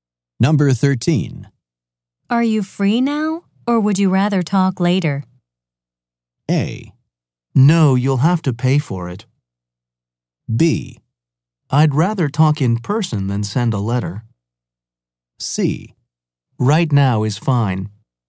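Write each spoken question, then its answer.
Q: Are you free now, or would you rather talk later?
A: C: Right now is fine.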